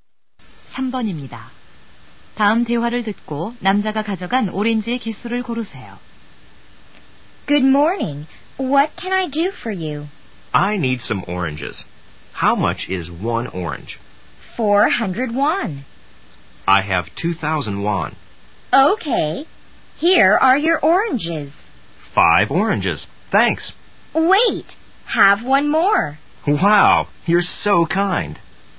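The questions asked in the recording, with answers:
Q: 다음 대화를 듣고 남자가 가져간 오렌지의 개수를 고르세요.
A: 6개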